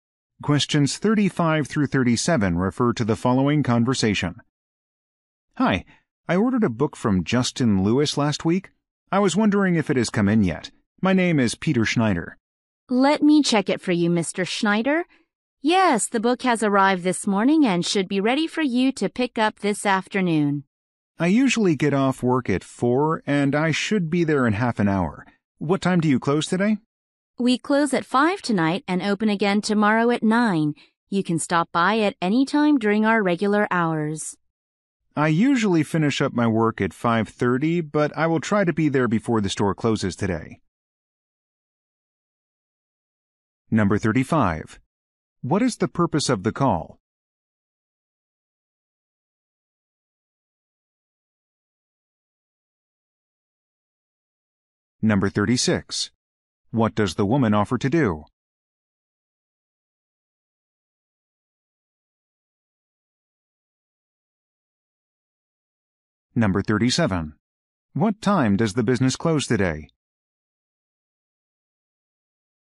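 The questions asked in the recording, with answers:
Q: What is the purpose of the call?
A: To check whether an ordered book has arrived

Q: What time does the business close today?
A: At 5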